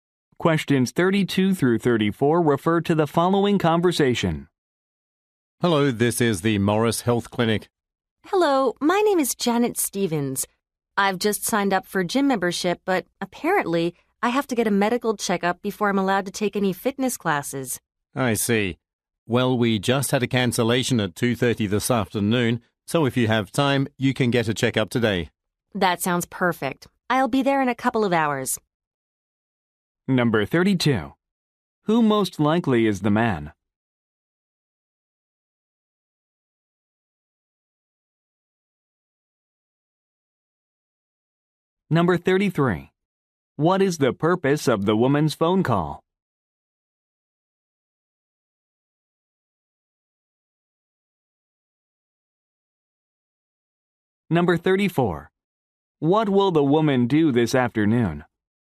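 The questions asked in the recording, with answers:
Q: What is the purpose of the woman's phone call?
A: To get a medical checkup required before taking fitness classes

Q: What will the woman do this afternoon?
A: Go to the clinic for a medical checkup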